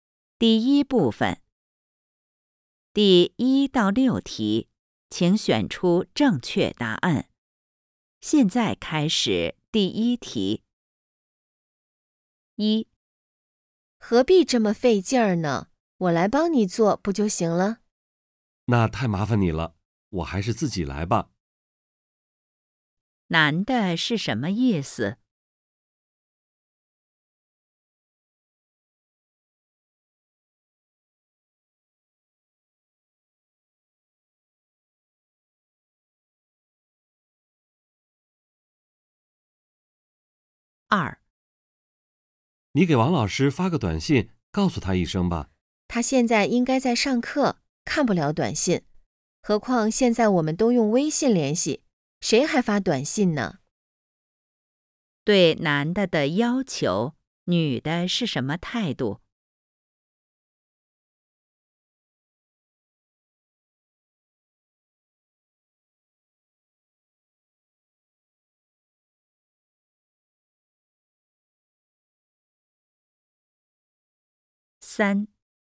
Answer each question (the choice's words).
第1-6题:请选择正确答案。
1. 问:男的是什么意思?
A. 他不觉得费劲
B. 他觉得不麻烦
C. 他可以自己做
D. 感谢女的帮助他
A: 他可以自己做

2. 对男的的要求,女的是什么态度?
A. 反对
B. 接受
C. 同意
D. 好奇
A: 反对

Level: HSK 5